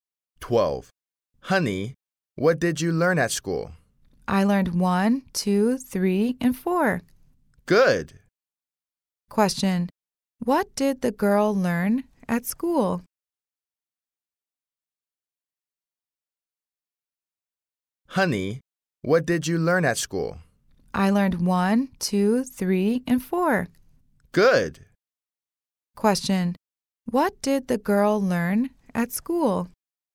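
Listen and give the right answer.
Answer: Numbers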